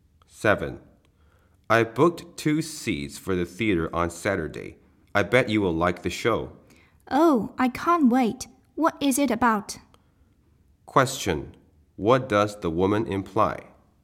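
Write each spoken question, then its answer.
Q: What does the woman imply?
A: She is eager to see the show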